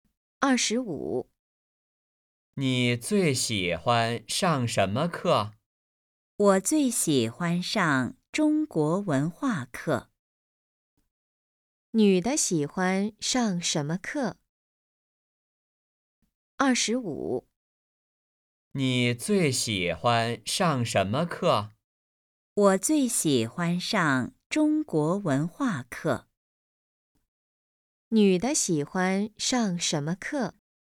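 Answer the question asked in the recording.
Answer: 中国文化课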